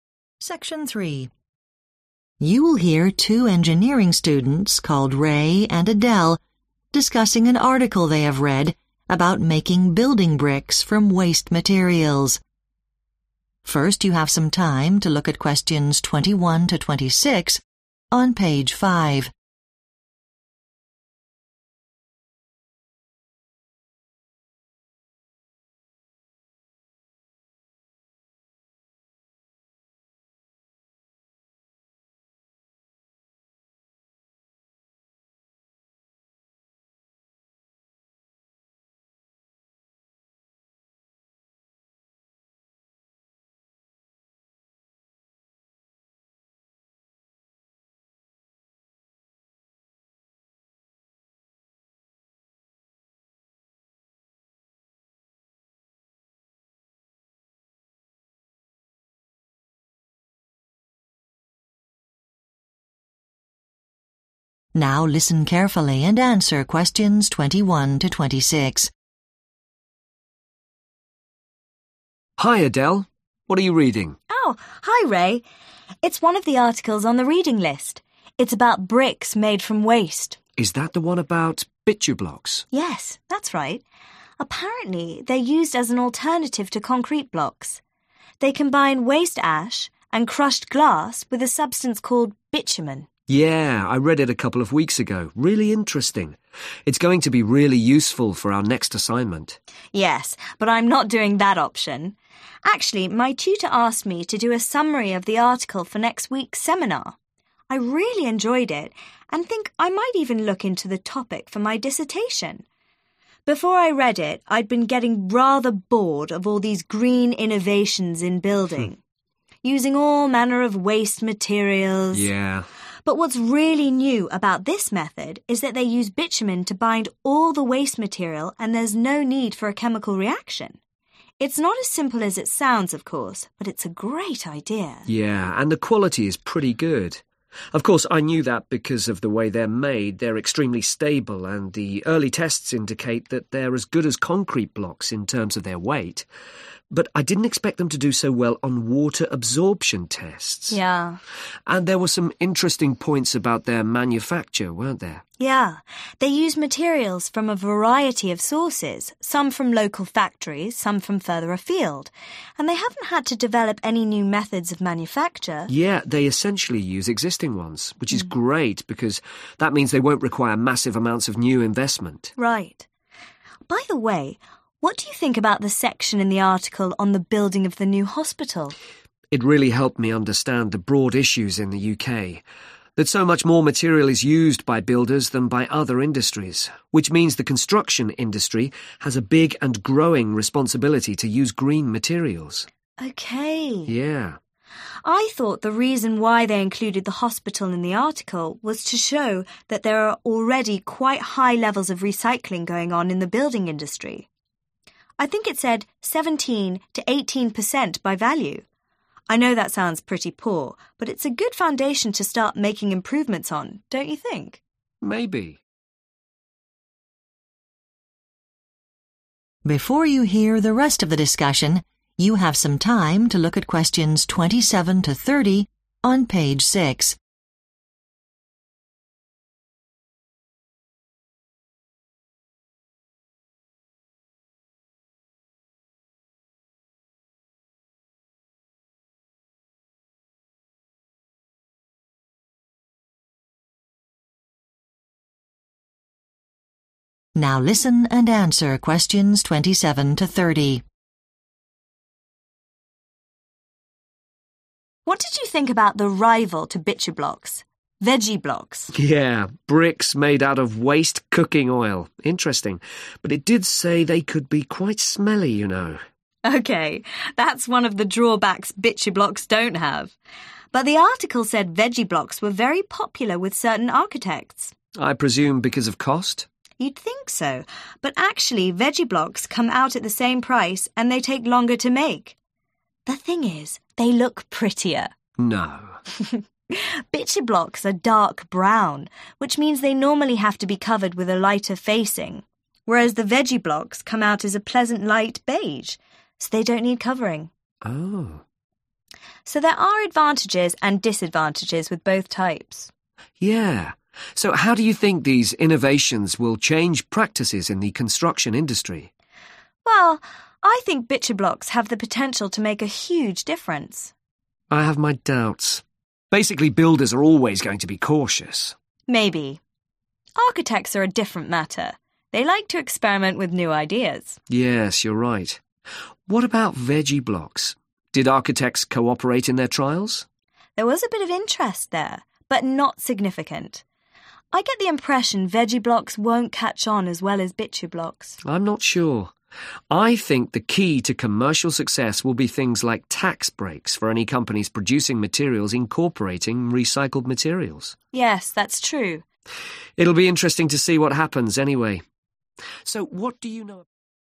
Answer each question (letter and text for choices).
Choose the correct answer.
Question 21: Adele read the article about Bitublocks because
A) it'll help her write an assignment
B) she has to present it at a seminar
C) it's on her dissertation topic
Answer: B) she has to present it at a seminar

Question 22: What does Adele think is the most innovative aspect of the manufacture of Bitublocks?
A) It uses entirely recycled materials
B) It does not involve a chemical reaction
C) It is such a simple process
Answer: B) It does not involve a chemical reaction

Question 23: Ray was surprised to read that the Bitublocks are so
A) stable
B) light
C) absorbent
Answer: C) absorbent

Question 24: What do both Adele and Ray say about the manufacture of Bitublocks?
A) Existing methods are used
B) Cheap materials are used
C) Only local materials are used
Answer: A) Existing methods are used

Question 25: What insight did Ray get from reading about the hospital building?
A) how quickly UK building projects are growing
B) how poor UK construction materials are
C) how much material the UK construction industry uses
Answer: C) how much material the UK construction industry uses

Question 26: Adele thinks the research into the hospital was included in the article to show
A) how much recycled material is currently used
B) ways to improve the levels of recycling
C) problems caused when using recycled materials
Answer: A) how much recycled material is currently used